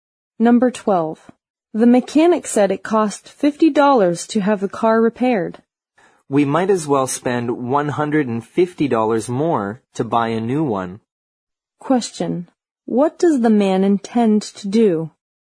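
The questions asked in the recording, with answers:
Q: What does the man intend to do?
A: Buy a new car instead of having the old one repaired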